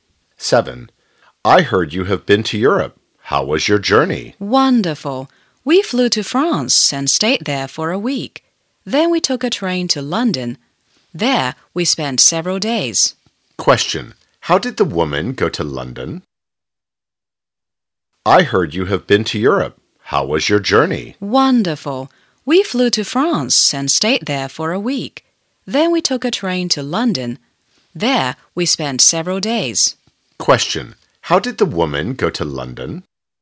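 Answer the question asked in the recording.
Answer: By train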